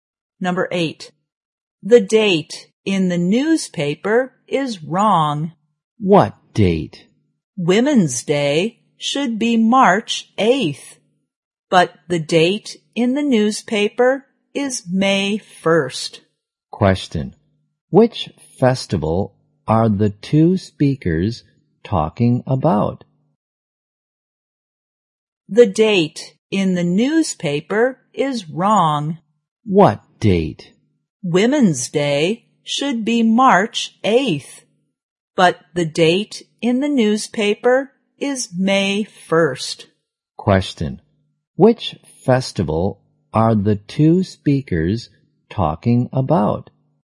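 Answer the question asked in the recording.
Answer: Women's Day.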